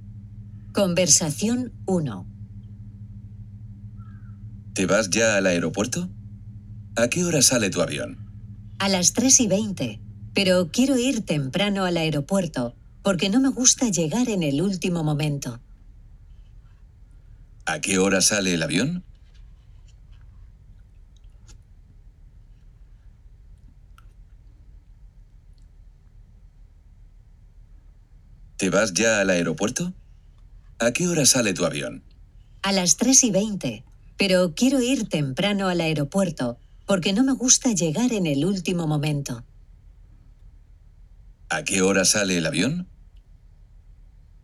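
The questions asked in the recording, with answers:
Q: ¿A qué hora sale el avión?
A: A las 3:20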